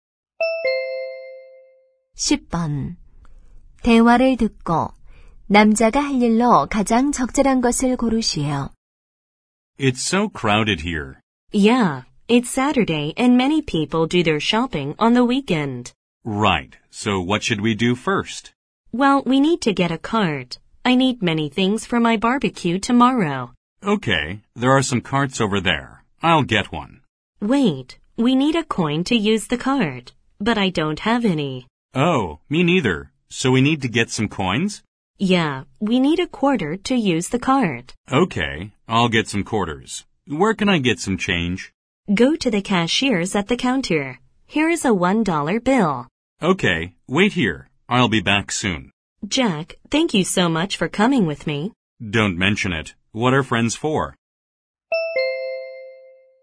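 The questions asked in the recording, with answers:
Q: 대화를 듣고 남자가 할 일로 가장 적절한 것을 고르시오.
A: 계산대에 가서 동전(쿼터)으로 바꿔 오기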